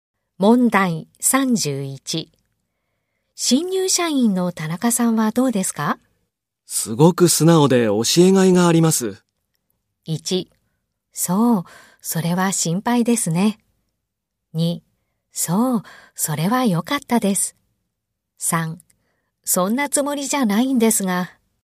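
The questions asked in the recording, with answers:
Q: 新入社員の田中さんはどうですか?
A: 2: そう、それは良かったです。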